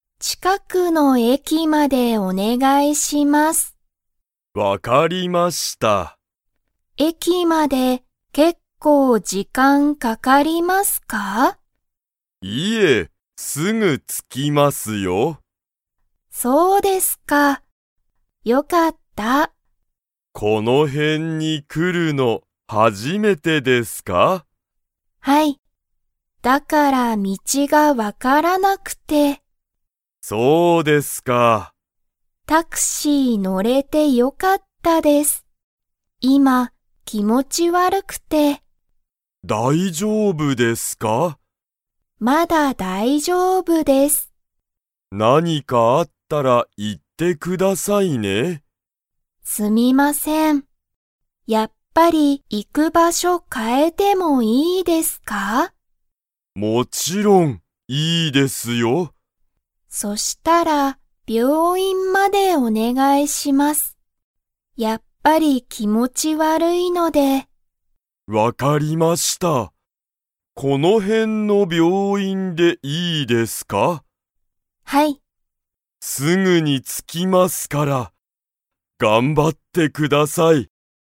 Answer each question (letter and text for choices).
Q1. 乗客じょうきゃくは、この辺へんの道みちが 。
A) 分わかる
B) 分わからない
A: B) 分わからない

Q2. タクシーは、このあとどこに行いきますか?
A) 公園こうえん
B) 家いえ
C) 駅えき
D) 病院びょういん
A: D) 病院びょういん

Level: Level 3